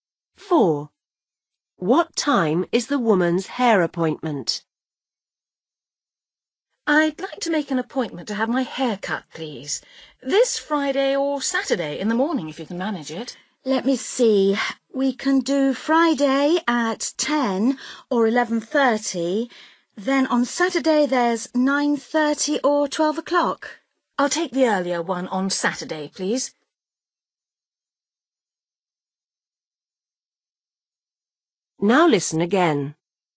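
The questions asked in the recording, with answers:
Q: What time is the woman's hair appointment?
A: 9:30 on Saturday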